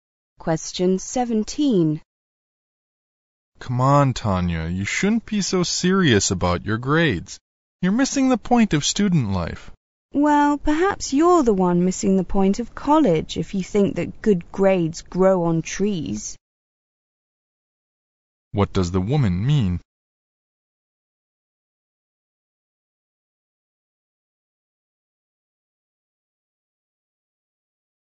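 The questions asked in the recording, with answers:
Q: What does the woman mean?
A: Good grades need hard work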